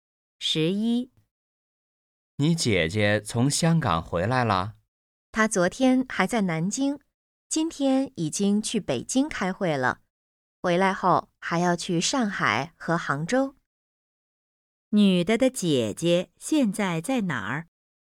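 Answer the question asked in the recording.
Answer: 北京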